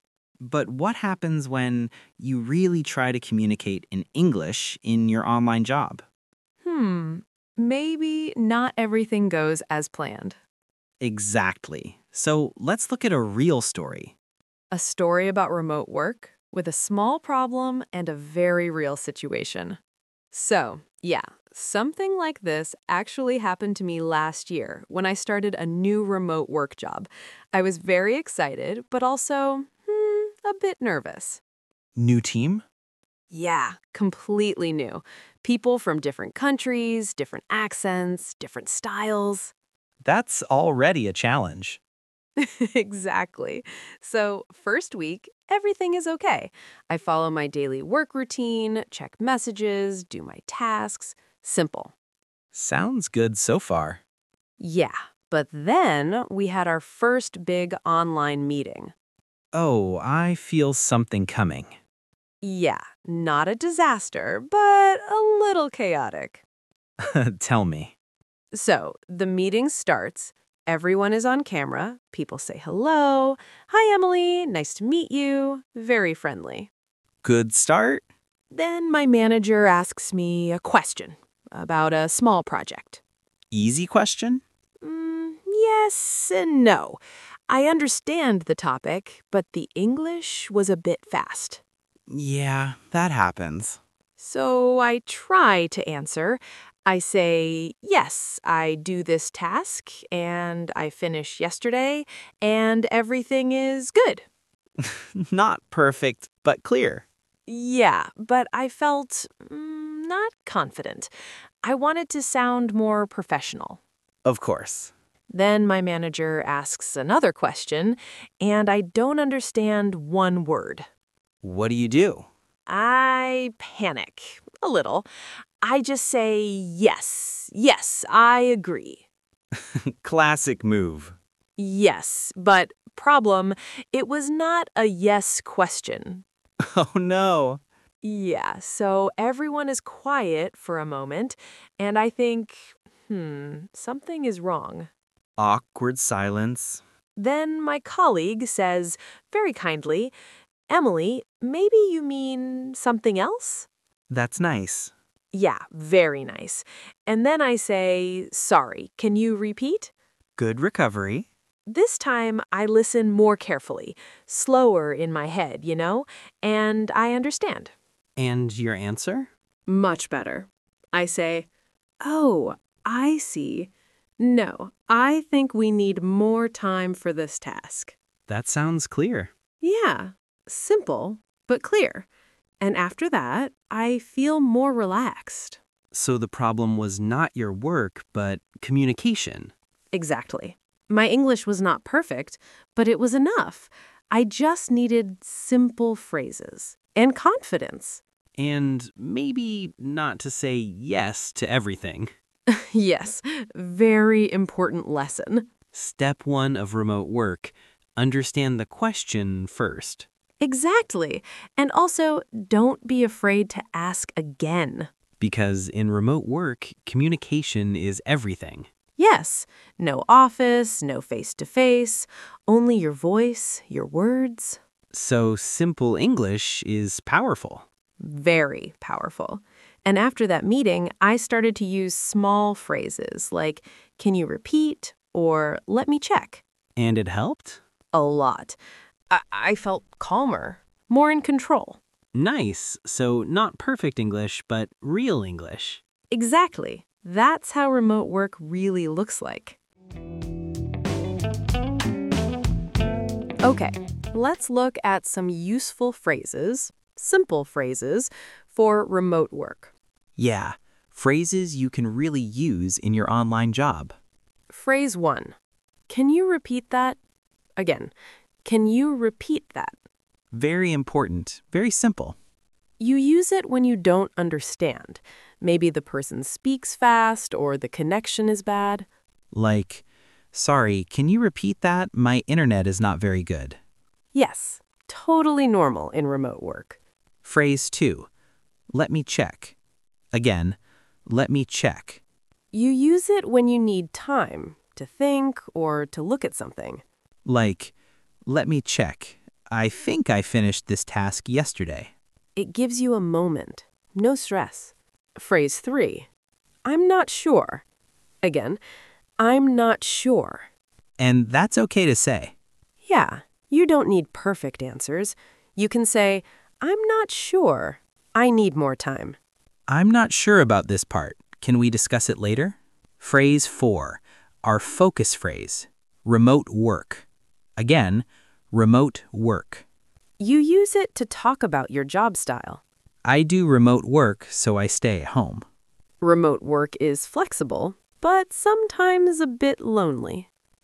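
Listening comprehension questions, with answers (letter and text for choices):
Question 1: What was Emily's problem in the online meeting?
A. Her internet stopped working.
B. She didn't understand a question and said "yes" when it wasn't a "yes" question.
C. Her dog was barking loudly.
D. She was late for the meeting.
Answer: B. She didn't understand a question and said "yes" when it wasn't a "yes" question.

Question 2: Which phrase did Emily NOT use to fix the situation?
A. Can you repeat that?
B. Let me check.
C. I'll do it later.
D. I'm not sure.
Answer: C. I'll do it later.

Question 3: What is the main lesson from Emily's story?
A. You need perfect English for online jobs.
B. Communication is everything; it's okay to ask for help.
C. Never join an online meeting with a new team.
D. Always write your answers before speaking.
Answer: B. Communication is everything; it's okay to ask for help.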